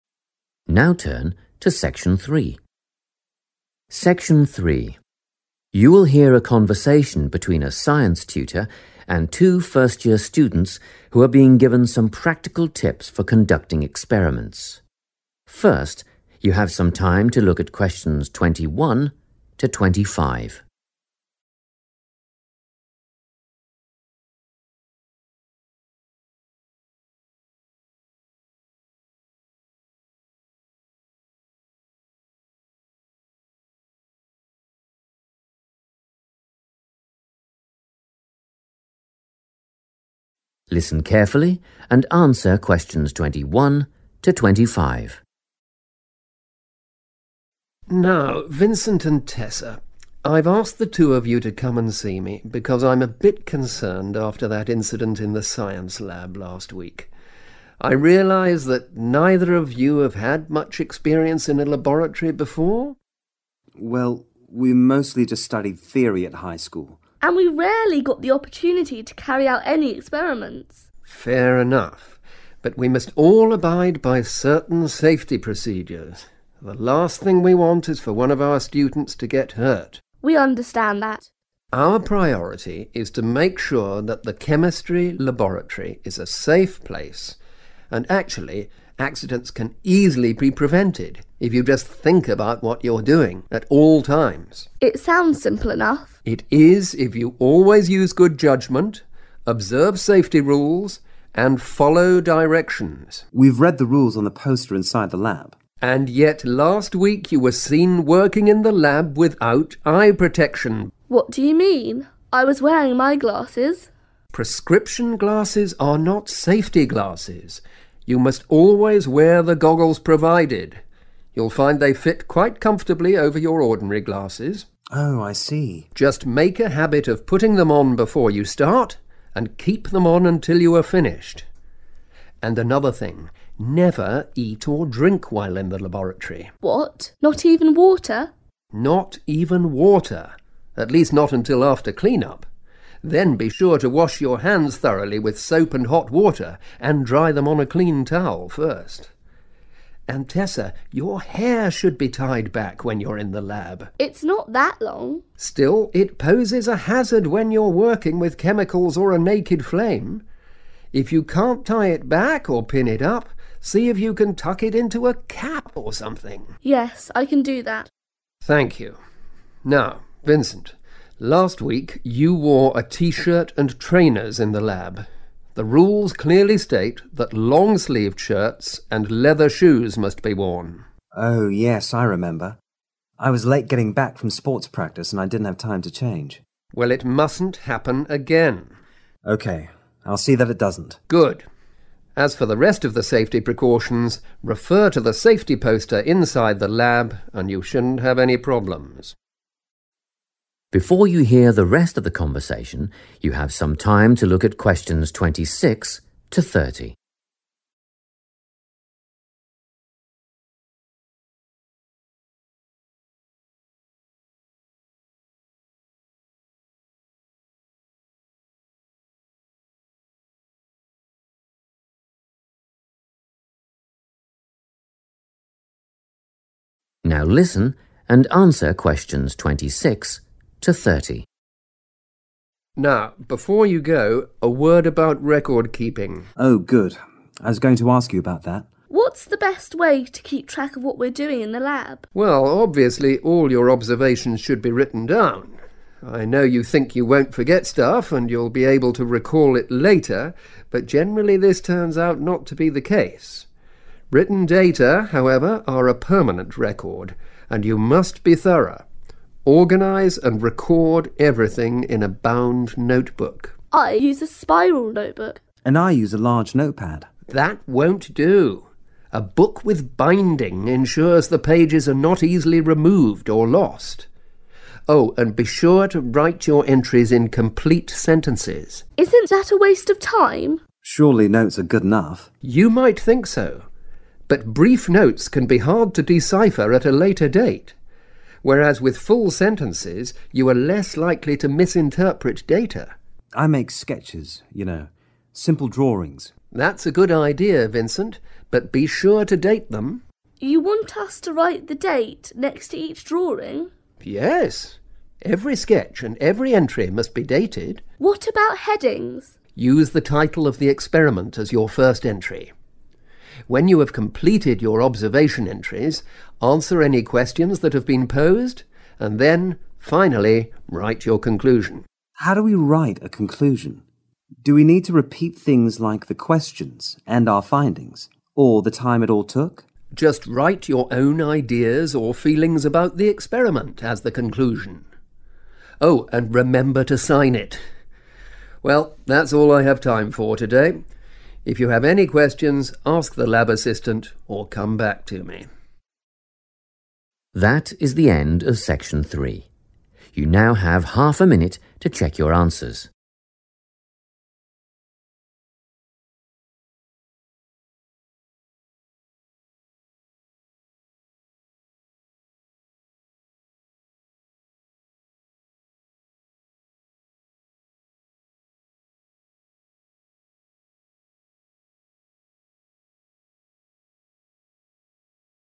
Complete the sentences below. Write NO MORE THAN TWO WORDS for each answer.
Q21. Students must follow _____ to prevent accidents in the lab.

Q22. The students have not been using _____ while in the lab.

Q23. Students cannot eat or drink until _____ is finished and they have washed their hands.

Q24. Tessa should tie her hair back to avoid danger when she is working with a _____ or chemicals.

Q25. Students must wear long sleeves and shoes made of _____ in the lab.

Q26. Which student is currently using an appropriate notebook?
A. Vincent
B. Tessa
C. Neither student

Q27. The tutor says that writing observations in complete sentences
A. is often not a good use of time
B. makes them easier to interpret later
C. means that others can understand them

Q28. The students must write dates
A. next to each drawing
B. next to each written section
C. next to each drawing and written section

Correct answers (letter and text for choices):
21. safety procedures / directions / safety rules
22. eye protection / safety glasses / goggles
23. clean-up / clean up / cleanup
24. naked flame
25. leather
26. C. Neither student
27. B. makes them easier to interpret later
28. C. next to each drawing and written section

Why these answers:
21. The correct answer includes 'safety procedures', 'directions', or 'safety rules' because the tutor explicitly states that following these is necessary to prevent students from getting hurt and to keep the laboratory safe. He uses words like 'abide by' and 'observe' as synonyms for 'follow'.
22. The correct answer is based on the tutor's comment about the students' behavior in the lab last week. He says they were working without 'eye protection'. He also uses the terms 'safety glasses' and 'goggles' to explain exactly what they should have been wearing instead of just their regular glasses.
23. The correct answer is 'clean-up' because the tutor explains that no food or water is allowed until after this specific task is done. The tutor uses the word 'after' to show that 'clean-up' is the necessary step that must happen first.
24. The correct answer comes from the tutor's warning to Tessa about her hair being loose. He explains that even if her hair is not very long, it still creates a 'hazard' (a danger) when she is using chemicals or fire that is not covered. Therefore, she needs to tie it back to stay safe.
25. The correct answer is "leather" because when the tutor corrects Vincent for wearing trainers (soft sports shoes), he reminds him that the lab rules require specific types of clothing for safety. These rules mention that students must wear shirts with long sleeves and shoes that are made of leather.
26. The correct answer is C because the tutor wants the students to use a 'bound notebook' where the pages are permanently attached. Tessa says she uses a 'spiral notebook,' and Vincent says he uses a 'large note pad.' The tutor responds by saying, 'That won't do,' which means their current choices are not acceptable or appropriate. He explains that pages must not be easily removed, and spiral notebooks or pads allow pages to be torn out and lost.
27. The correct answer is B because the tutor explains that short notes are often difficult to read or understand clearly after some time has passed. By using full sentences, a student can avoid getting the wrong idea about their own information later. The tutor uses the word 'decipher' to mean 'to understand' and warns against 'misinterpreting,' which means understanding something in the wrong way.
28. The correct answer is C because the tutor explains that all types of records in the notebook need a date. First, the tutor tells Vincent to date his drawings, which he calls 'sketches.' Then, the tutor adds that 'every entry' must also be dated. In this context, an 'entry' refers to a written section or a piece of data recorded in the book. Therefore, both drawings and written parts must have dates. Important words to know are 'sketch' (synonym for drawing) and 'entry' (synonym for a written record).

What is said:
You will hear a conversation between a science tutor and two first-year students who are being given some practical tips for conducting experiments. First, you have some time to look at questions 21 to 25.
Listen carefully and answer questions 21 to 25.
TUTOR: Now Vincent and Tessa, I've asked the two of you to come and see me because I'm a bit concerned after that incident in the science lab last week. I realise that neither of you have had much experience in a laboratory before ...
VINCENT: Well, we mostly just studied theory at high school ...
TESSA: and we rarely got the opportunity to carry out any experiments.
TUTOR: Fair enough. But we must all abide by certain safety procedures – the last thing we want is for one of our students to get hurt.
TESSA: We understand that.
TUTOR: Our priority is to make sure that the chemistry laboratory is a safe place and, actually, accidents can easily be prevented if you just think about what you're doing at all times.
TESSA: It sounds simple enough.
TUTOR: It is if you always use good judgement, observe safety rules and follow directions.
VINCENT: We've read the rules on the poster inside the lab.
TUTOR: And yet last week you were seen working in the lab without eye protection.
TESSA: What do you mean? I was wearing my glasses.
TUTOR: Prescription glasses are not safety glasses – you must always wear the goggles provided – you'll find they fit quite comfortably over your ordinary glasses.
VINCENT: Oh, I see.
TUTOR: Just make a habit of putting them on before you start and keep them on until you are finished. And another thing, never eat or drink while in the laboratory.
TESSA: What – not even water?
TUTOR: Not even water – at least not until after clean-up. Then, be sure to wash your hands thoroughly with soap and hot water and dry them on a clean towel first. And Tessa, your hair should be tied back when you're in the lab.
TESSA: It's not that long.
TUTOR: Still, it poses a hazard when you're working with chemicals or a naked flame. If you can't tie it back or pin it up, see if you can tuck it into a cap or something.
TESSA: Yes, I can do that.
TUTOR: Thank you. Now, Vincent, last week you wore a tee-shirt and trainers in the lab. The rules clearly state that long-sleeved shirts and leather shoes must be worn.
VINCENT: Oh, yes, I remember – I was late getting back from sports practice and I didn't have time to change.
TUTOR: Well, it mustn't happen again.
VINCENT: Okay, I'll see that it doesn't.
TUTOR: Good. As for the rest of the safety precautions, refer to the safety poster inside the lab and you shouldn't have any problems.
Before you hear the rest of the conversation, you have some time to look at questions 26 to 30.
Now listen and answer questions 26 to 30.
TUTOR: Now, before you go, a word about record-keeping.
VINCENT: Oh, good – I was going to ask you about that.
TESSA: What's the best way to keep track of what we're doing in the lab?
TUTOR: Well, obviously, all your observations should be written down – I know you think you won't forget stuff and you'll be able to recall it later but generally this turns out not to be the case. Written data, however, are a permanent record. And you must be thorough. Organise and record everything in a bound notebook.
TESSA: I use a spiral notebook.
VINCENT: And I use a large note pad.
TUTOR: That won't do. A book with binding ensures the pages are not easily removed or lost. Oh, and be sure to write your entries in complete sentences.
TESSA: Isn't that a waste of time?
VINCENT: Surely notes are good enough.
TUTOR: You might think so but brief notes can be hard to decipher at a later date, whereas with full sentences you are less likely to misinterpret data.
VINCENT: I make sketches, you know, simple drawings.
TUTOR: That's a good idea, Vincent, but be sure to date them.
TESSA: You want us to write the date next to each drawing?
TUTOR: Yes, every sketch and every entry must be dated.
TESSA: What about headings?
TUTOR: Use the title of the experiment as your first entry. When you have completed your observation entries, answer any questions that have been posed and then, finally, write your conclusion.
VINCENT: How do we write a conclusion? Do we need to repeat things like the questions and our findings, or the time it all took?
TUTOR: Just write your own ideas or feelings about the experiment as the conclusion. Oh ... and remember to sign it! Well, that's all I have time for today. If you have any questions, ask the lab assistant or come back to me.
That is the end of section 3. You now have half a minute to check your answers.